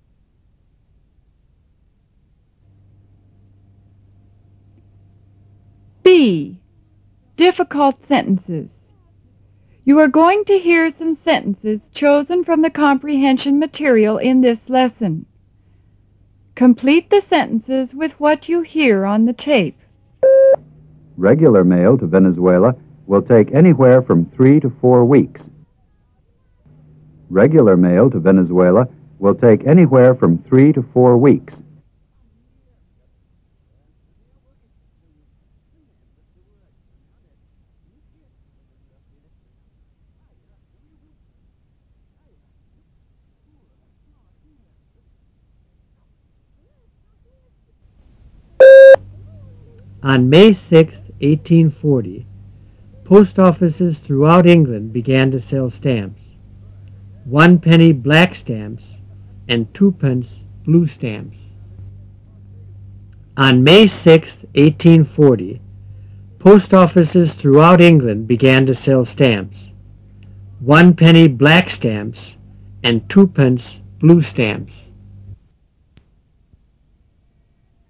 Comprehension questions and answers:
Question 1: ____to Venezuela will take _______________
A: Regular mail/ anywhere from three to four weeks

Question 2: ____, post offices throughout England ______—"One Penny" black stamps and"Two Pence" bluc stamps.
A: On May 6,1840/began to sell stamps